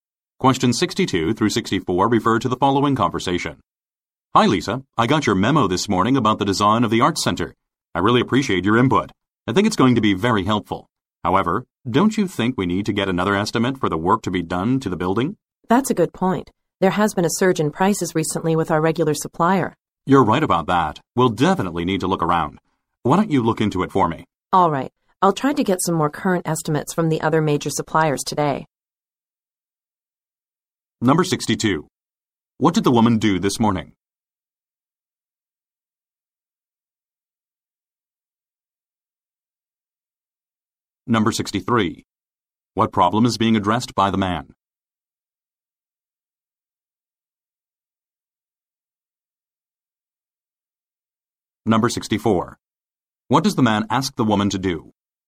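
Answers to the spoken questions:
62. Sent a memo about the Arts Center design
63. Prices from the regular supplier have gone up
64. Get estimates from other suppliers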